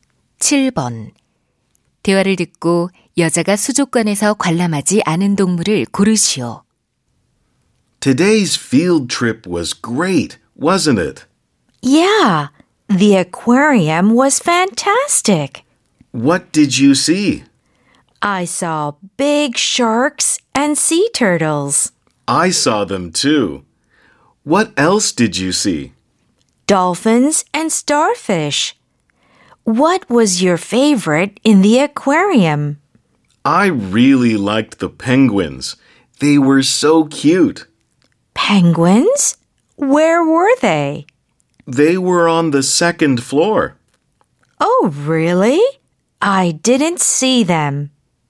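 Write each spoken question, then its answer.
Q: 대화를 듣고 여자가 수족관에서 관람하지 않은 동물을 고르시오.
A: 펭귄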